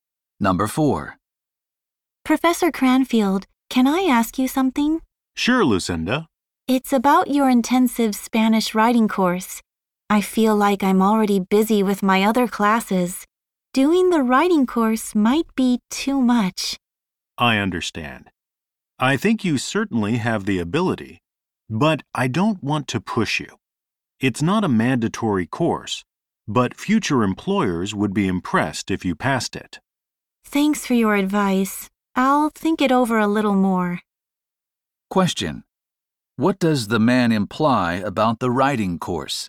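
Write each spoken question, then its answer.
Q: What does the man imply about the writing course?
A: It is not required, but passing it would impress future employers.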